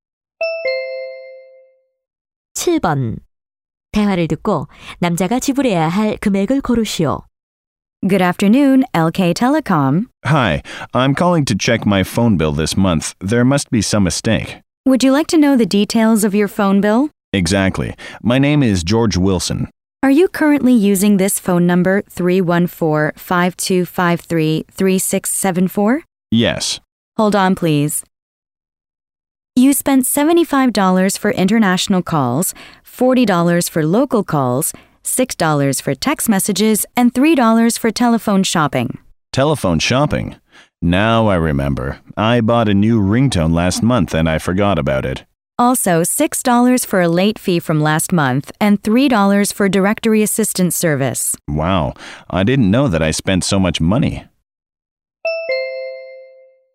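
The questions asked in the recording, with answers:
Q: 대화를 듣고 남자가 지불해야 할 금액을 고르시오.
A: $133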